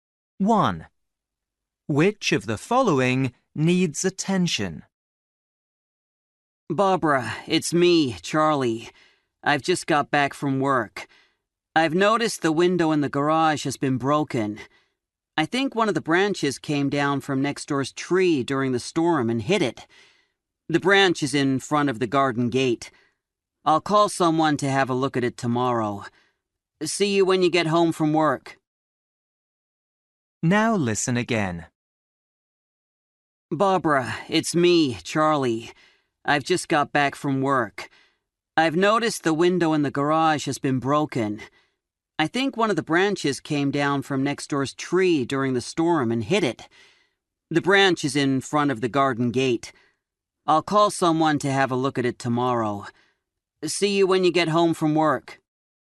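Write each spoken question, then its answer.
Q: Which of the following needs attention?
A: the garage window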